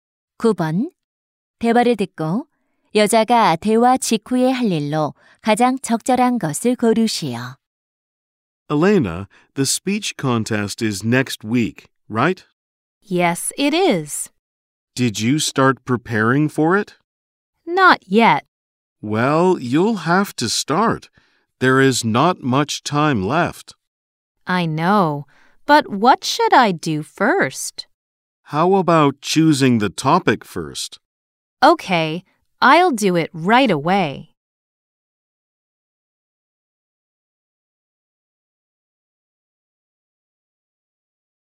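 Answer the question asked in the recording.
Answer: 연설 주제 정하기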